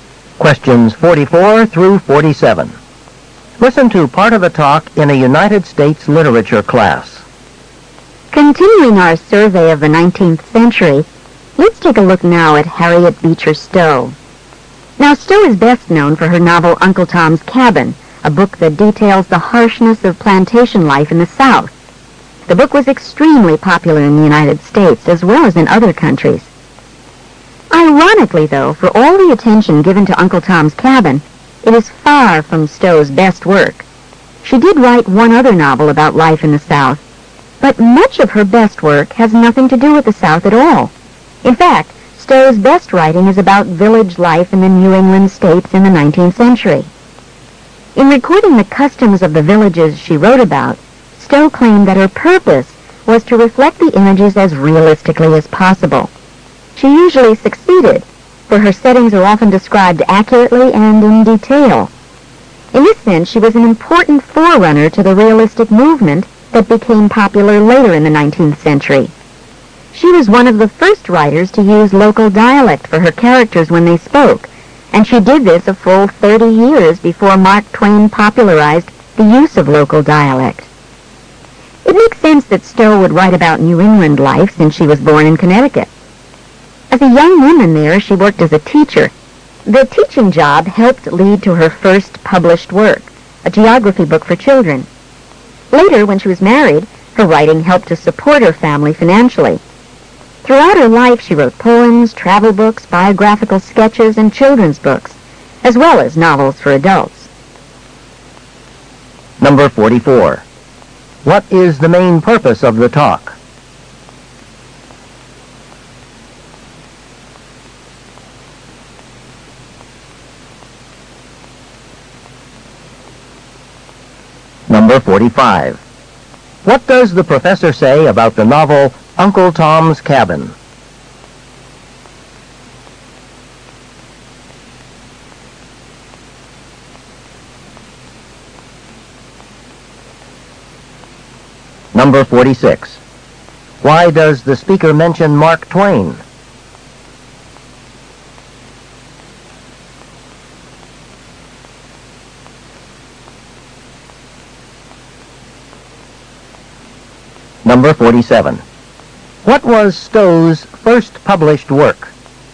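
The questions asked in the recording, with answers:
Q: What is the main purpose of the talk?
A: To discuss Harriet Beecher Stowe's writing

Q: What does the professor say about the novel Uncle Tom's Cabin?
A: It was very popular but not her best work

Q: Why does the speaker mention Mark Twain?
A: Stowe used local dialect 30 years before he popularized it

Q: What was Stowe's first published work?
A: A geography book for children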